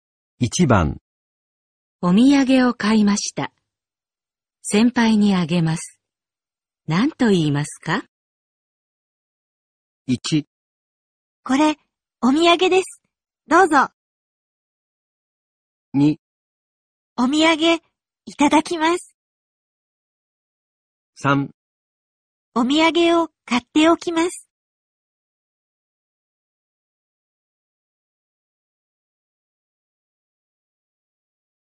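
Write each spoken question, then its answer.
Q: お土産を買いました。先輩にあげます。何と言いますか?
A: 1: これ、お土産です。どうぞ。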